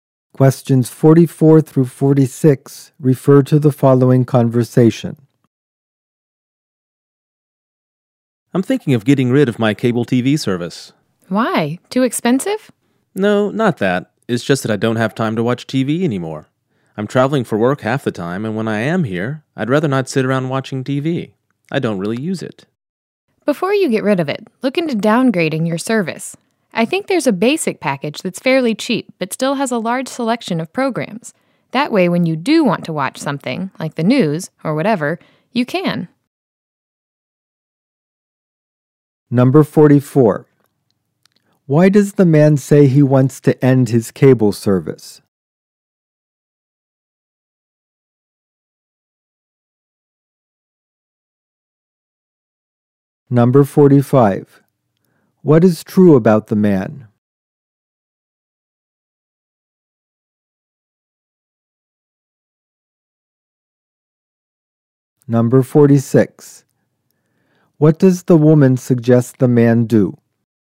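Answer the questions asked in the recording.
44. He doesn't have time to watch TV
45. He travels for work half the time
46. Downgrade to a cheaper basic package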